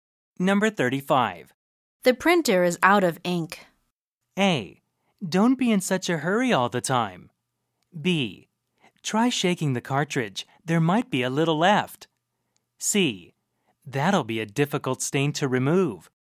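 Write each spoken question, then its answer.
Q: The printer is out of ink.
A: B: Try shaking the cartridge. There might be a little left.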